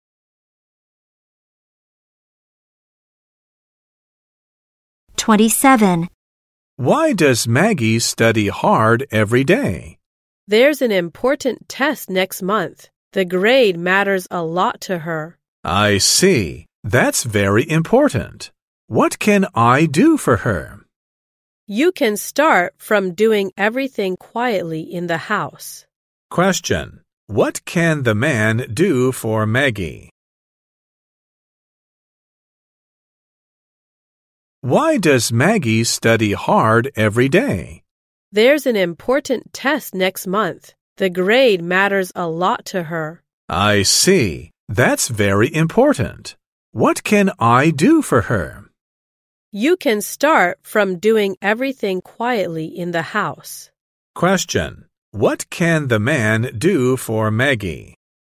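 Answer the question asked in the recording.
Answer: Do everything quietly in the house.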